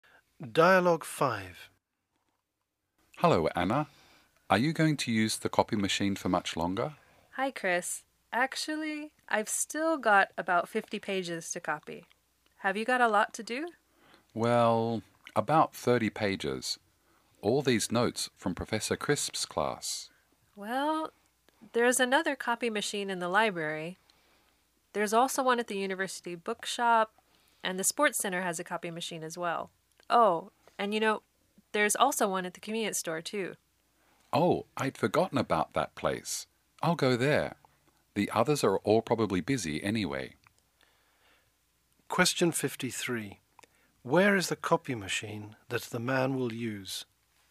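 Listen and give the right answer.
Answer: At the convenience store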